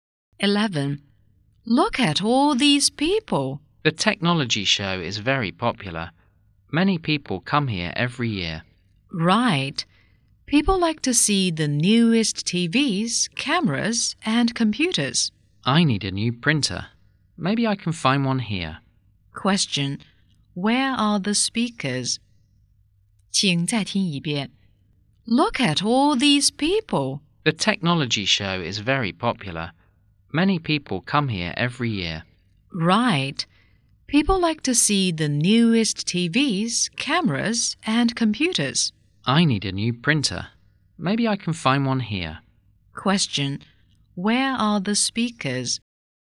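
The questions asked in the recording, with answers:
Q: Question. Where are the speakers?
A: At a technology show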